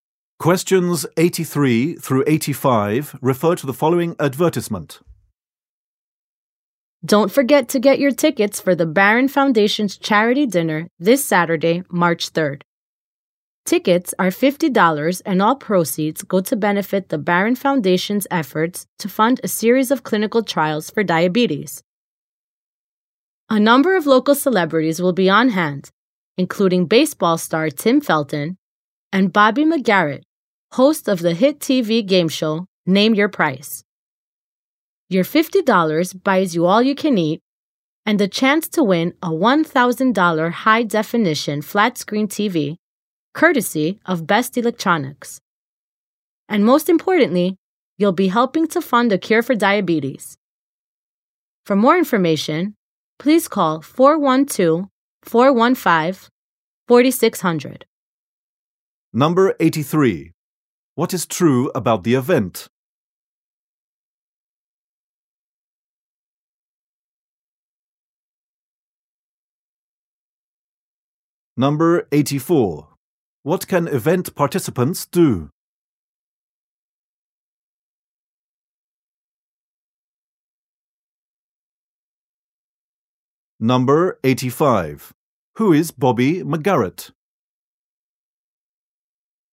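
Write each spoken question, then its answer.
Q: Who is Bobby McGarrett?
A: A TV game show host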